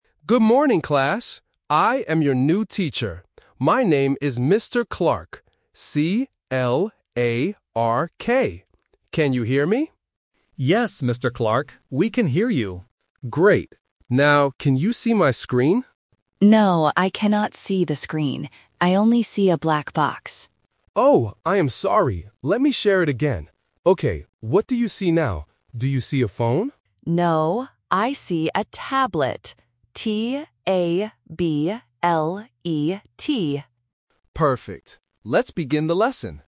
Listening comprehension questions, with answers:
Listen to the conversation and choose the correct answer (A, B, or C).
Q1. How does the teacher spell his name?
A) C-L-E-R-K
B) P-A-R-K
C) C-L-A-R-K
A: C-L-A-R-K

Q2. What does Mia see at first?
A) A black box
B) A blue box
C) The screen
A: A black box

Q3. What device do they see on the screen at the end?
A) A phone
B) A tablet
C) A computer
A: A tablet

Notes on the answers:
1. The correct answer is C. The teacher clearly spells his name: "C-L-A-R-K". Option A (C-L-E-R-K) is a trap because the letters "A" and "E" are often misheard by beginners. Option B (P-A-R-K) is a trap because it rhymes and sounds very similar to "Clark".
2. The correct answer is A. Mia explicitly says, "I only see a black box". Option C (The screen) is the trap because the teacher asks "can you see my screen?", but Mia says "No". Option B (A blue box) is just a plausible wrong color.
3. The correct answer is B. Mia says, "I see a tablet", and she spells the word "T-A-B-L-E-T". Option A (A phone) is the trap because the teacher asks, "Do you see a phone?", but Mia rejects it by saying "No". Option C is not mentioned.

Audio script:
Teacher: Good morning, class. I am your new teacher. My name is Mr. Can you hear me?
Leo: Yes, Mr. Clark. We can hear you.
Teacher: Great. Now, can you see my screen?
Mia: No, I cannot see the screen. I only see a black box.
Teacher: Oh, I am sorry. Let me share it again. Okay, what do you see now? Do you see a phone?
Mia: No, I see a tablet. T-A-B-L-E-T.
Teacher: Perfect. Let's begin the lesson.

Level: A1

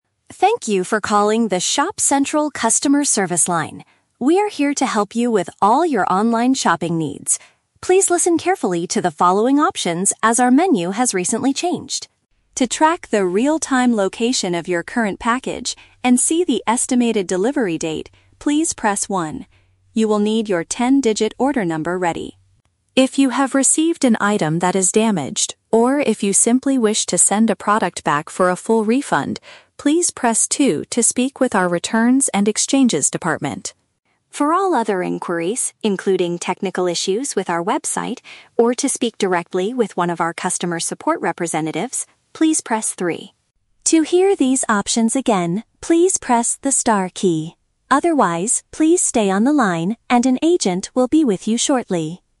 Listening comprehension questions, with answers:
Listen to the automated phone menu and choose the best answer (A, B, or C) for each question.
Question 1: What should a customer do to find out when their package will arrive?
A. Wait on the line to talk to an agent immediately.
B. Press the first button on their phone's keypad.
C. Enter their ten-digit phone number after the tone.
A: Press the first button on their phone's keypad.

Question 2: Which option is suitable for someone who wants their money back?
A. Option 1: Tracking and delivery services.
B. Option 2: Returns and refunds department.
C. Option 3: Technical support and website help.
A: Option 2: Returns and refunds department.

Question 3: When should a caller press 3?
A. When they need to change their delivery address.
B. When they want to hear the menu options one more time.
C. When they need to have a conversation with a real person.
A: When they need to have a conversation with a real person.

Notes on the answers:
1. The system says, "To track... the estimated delivery date, please press 1." Option B paraphrases "press 1" as "press the first button." Why the trap is wrong: Option (C) is a trap. You need an "order number," not a "phone number." Option (A) is for "all other inquiries," not specific tracking.
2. The system says to press 2 if you "wish to send a product back for a full refund." Option B directly matches this. Why the trap is wrong: Option (A) is for tracking. Option (C) is for technical issues or direct support.
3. Pressing 3 is to "speak directly with one of our customer support representatives." Option C paraphrases this as "have a conversation with a real person." Why the trap is wrong: Option (B) is a trap; to hear the options again, you must press the "star key," not 3. Option (A) is not explicitly mentioned but would likely fall under Option 1 or 2 depending on the stage of the order.

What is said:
Automated Voice: Thank you for calling the ShopCentral Customer Service line. We are here to help you with all your online shopping needs. Please listen carefully to the following options as our menu has recently changed.
To track the real-time location of your current package and see the estimated delivery date, please press 1. You will need your ten-digit order number ready.
If you have received an item that is damaged, or if you simply wish to send a product back for a full refund, please press 2 to speak with our returns and exchanges department.
For all other inquiries, including technical issues with our website or to speak directly with one of our customer support representatives, please press 3.
To hear these options again, please press the star key. Otherwise, please stay on the line and an agent will be with you shortly.

